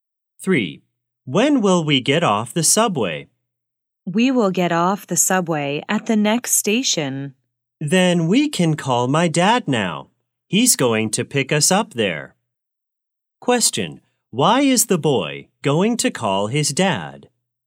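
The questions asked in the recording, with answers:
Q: Question, why is the boy going to call his dad?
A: His dad is going to pick them up at the next station.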